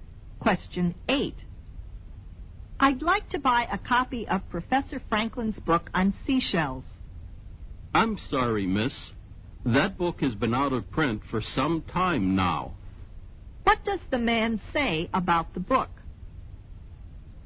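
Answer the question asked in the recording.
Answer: It has been out of print for some time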